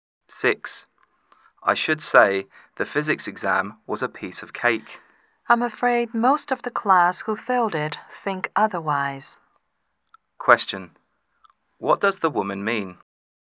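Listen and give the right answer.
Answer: Most of the students who failed thought the exam was hard.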